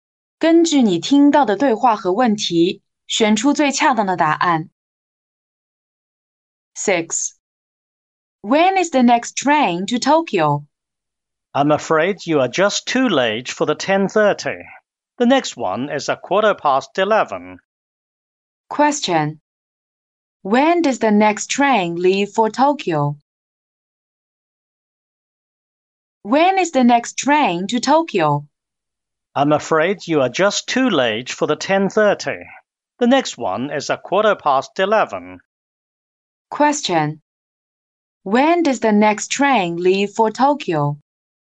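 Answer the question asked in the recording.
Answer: At 11:15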